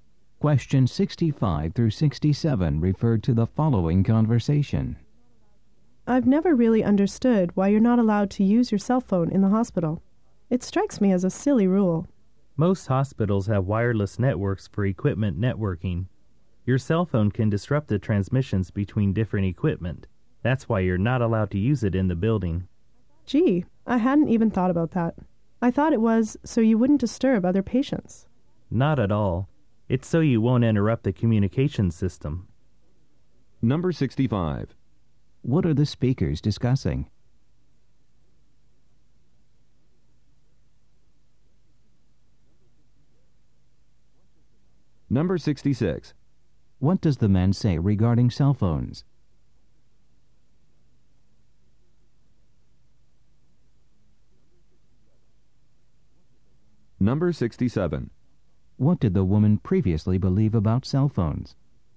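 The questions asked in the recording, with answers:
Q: What are the speakers discussing?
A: Why cell phones aren't allowed in hospitals

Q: What does the man say regarding cell phones?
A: They can disrupt transmissions between hospital equipment

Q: What did the woman previously believe about cell phones?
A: They would disturb other patients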